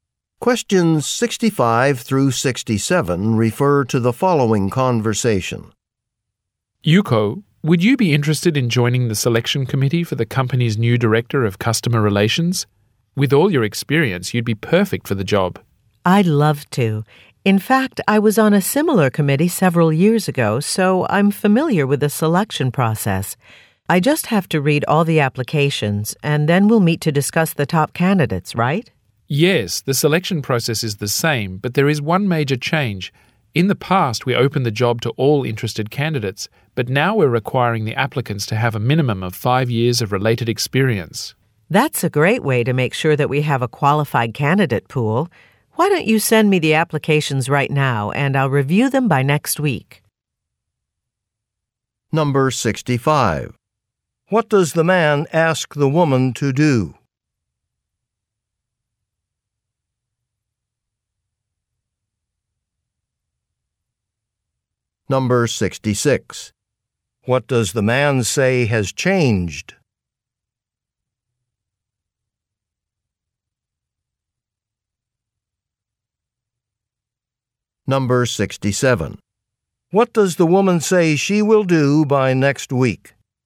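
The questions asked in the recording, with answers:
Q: What does the man ask the woman to do?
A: Join a selection committee

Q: What does the man say has changed?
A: Applicants now need at least 5 years of related experience

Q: What does the woman say she will do by next week?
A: Review the applications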